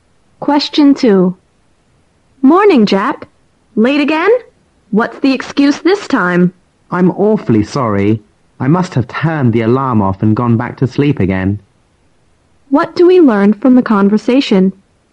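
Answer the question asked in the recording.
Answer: The man is often late; this time he overslept.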